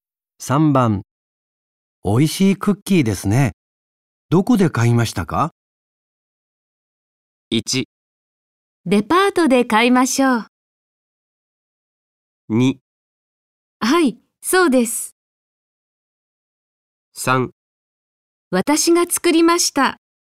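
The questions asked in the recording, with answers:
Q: おいしいクッキーですね。どこで買いましたか?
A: 3: 私が作りました。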